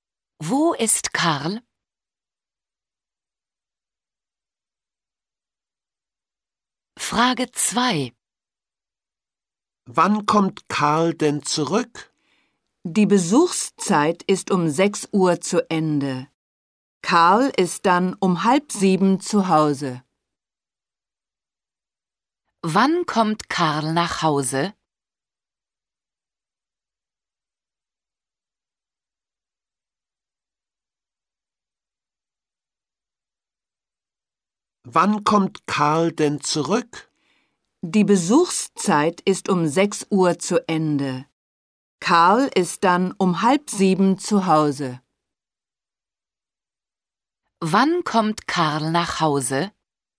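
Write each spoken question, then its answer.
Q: Wann kommt Karl nach Hause?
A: Um 6:30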